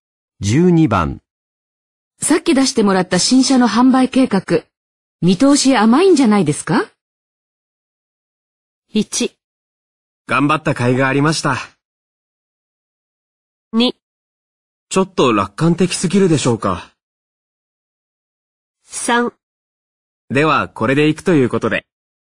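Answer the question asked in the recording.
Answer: 2: ちょっと楽観的すぎるでしょうか。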